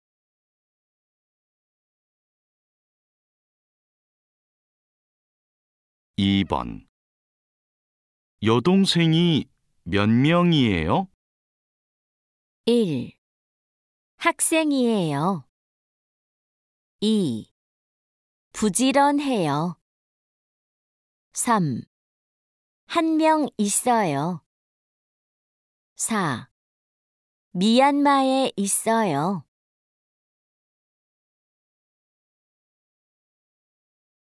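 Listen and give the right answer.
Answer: 3: 한 명 있어요.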